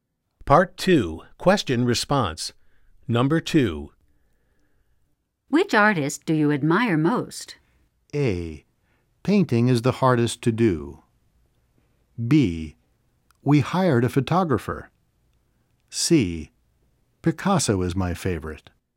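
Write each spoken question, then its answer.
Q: Which artist do you admire most?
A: C: Picasso is my favorite.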